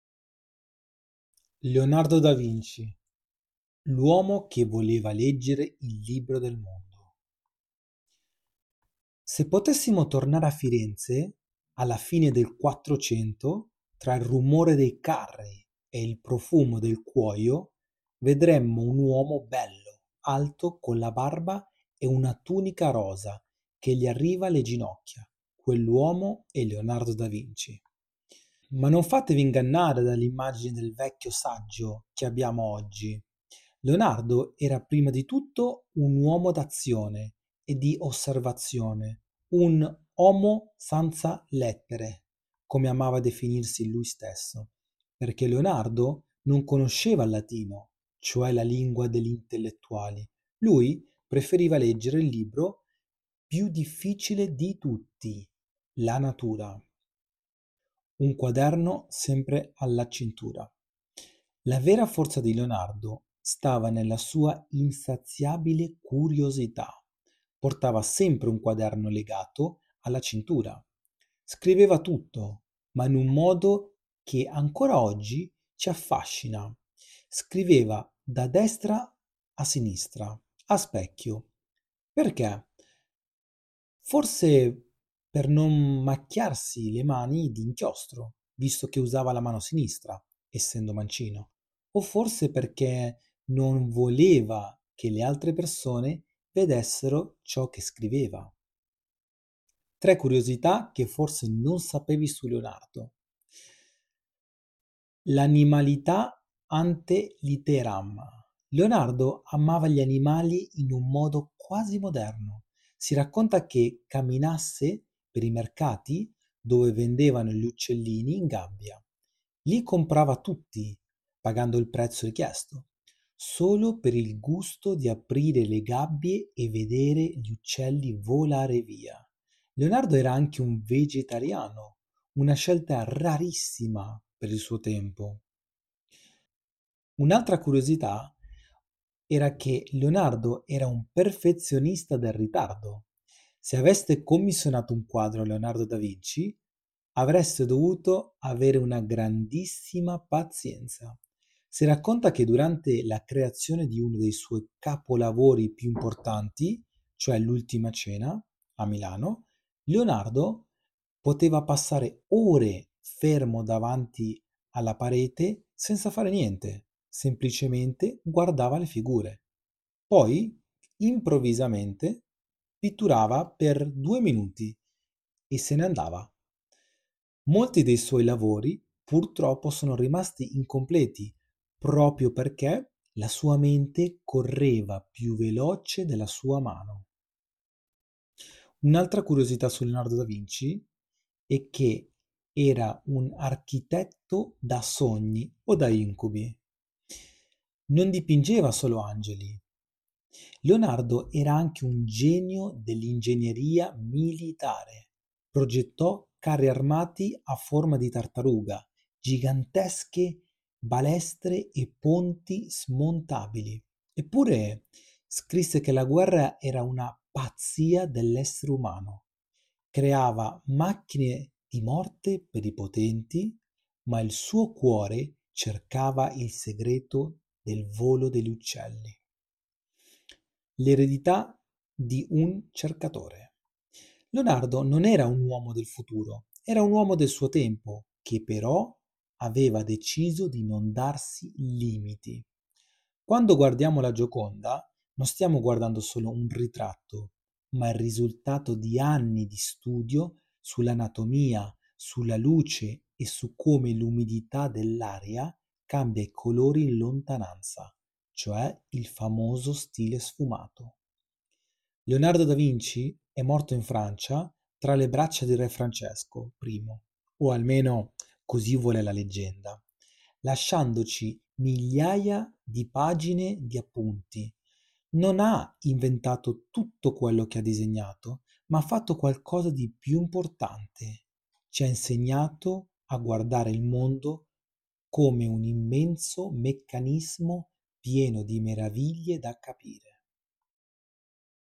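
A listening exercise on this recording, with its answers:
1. Come amava definirsi Leonardo per via della sua mancata conoscenza del latino?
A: Un "omo sanza lettere"

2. Perché Leonardo scriveva "a specchio" da destra verso sinistra?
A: Per non macchiarsi d'inchiostro essendo mancino o per riservatezza

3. Quale gesto faceva Leonardo nei mercati per amore degli animali?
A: Comprava uccellini in gabbia solo per liberarli

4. Quale scelta alimentare, rarissima per l'epoca, aveva adottato Leonardo?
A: Era vegetariano

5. Cosa faceva Leonardo durante la creazione dell'Ultima Cena a Milano?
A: Poteva stare ore a fissare la parete senza dipingere

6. Quale forma avevano i "carri armati" progettati da Leonardo?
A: A forma di tartaruga

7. Cos'è lo "sfumato" citato a proposito della Gioconda?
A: Una tecnica per rendere l'effetto dell'umidità e della luce

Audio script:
Leonardo Da Vinci: L'Uomo che Voleva Leggere il Libro del Mondo
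Se potessimo tornare a Firenze alla fine del Quattrocento, tra il rumore dei carri e il profumo del cuoio, vedremmo un uomo bello, alto, con la barba e una tunica rosa che gli arriva alle ginocchia: quell'uomo è Leonardo da Vinci.
Ma non fatevi ingannare dall'immagine del vecchio saggio che abbiamo oggi. Leonardo era, prima di tutto, un uomo d'azione e di osservazione, un "omo sanza lettere" – come amava definirsi lui stesso: perché Leonardo non conosceva il latino, cioe' la lingua degli intelletuali. Lui preferiva leggere il libro più difficile di tutti: la natura.
Un quaderno sempre alla cintura
La vera forza di Leonardo stava nella sua insaziabile curiosità. Portava sempre un quaderno legato alla cintura. Scriveva tutto, ma in un modo che ancora oggi ci affascina: scriveva da destra a sinistra, a specchio. Perché? Forse per non macchiarsi le mani di inchiostro, visto che usava la mano sinistra (essendo mancino), o forse perche' non voleva che le altre persone vedessero cio' che scriveva.
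Tre curiosità che forse non sapevi su Leonardo
L'animalista ante litteram: Leonardo amava gli animali in un modo quasi moderno. Si racconta che camminasse per i mercati dove vendevano gli uccellini in gabbia; li comprava tutti, pagando il prezzo richiesto, solo per il gusto di aprire le gabbie e vedere gli uccelli volare via. Leonardo era anche vegetariano, una scelta rarissima per il suo tempo.
Un perfezionista del ritardo: Se aveste commissionato un quadro a Leonardo Da Vinci , avreste dovuto avere una grandissima pazienza. Si racconta che durante la creazione di uno dei suoi capolavori piu' importanti cioe' l'Ultima Cena, a Milano, Leonardo poteva passare ore fermo davanti alla parete senza fare niente, semplicemente guardava le figure. Poi, improvvisamente, pitturava per due minuti e se ne andava. Molti dei suoi lavori purtroppo sono rimasti incompleti proprio perché la sua mente correva più veloce della sua mano.
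Architetto da sogni (e da incubi): Non dipingeva solo angeli. Progettò carri armati a forma di tartaruga, gigantesche balestre e ponti smontabili. Eppure, scrisse che la guerra era una "pazzia dell'essere umano". Creava macchine di morte per i potenti, ma il suo cuore cercava il segreto del volo degli uccelli.
L'eredità di un cercatore
Leonardo non era un uomo del futuro, era un uomo del suo tempo che, però, aveva deciso di non darsi limiti. Quando guardiamo la Gioconda, non stiamo guardando solo un ritratto, ma il risultato di anni di studi sull'anatomia, sulla luce e su come l'umidità dell'aria cambia i colori in lontananza, cioe' il famoso stile sfumato.
Leonardo Da Vinci e' morto in Francia, tra le braccia di Re Francesco I (o almeno così vuole la leggenda), lasciandoci migliaia di pagine di appunti. Non ha inventato tutto quello che ha disegnato, ma ha fatto qualcosa di più importante: ci ha insegnato a guardare il mondo come un immenso meccanismo pieno di meraviglie da capire.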